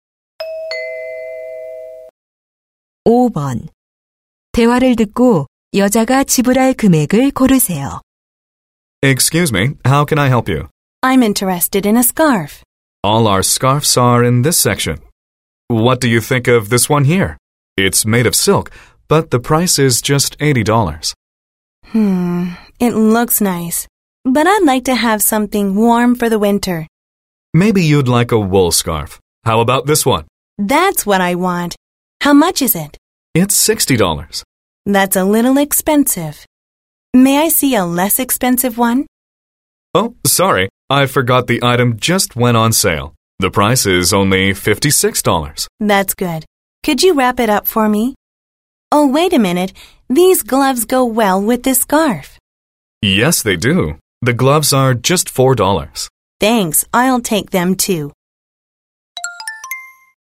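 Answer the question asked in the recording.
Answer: $60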